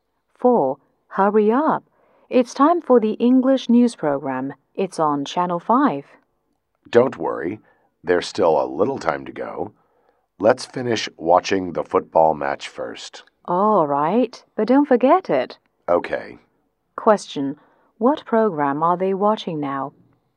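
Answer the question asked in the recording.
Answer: A football match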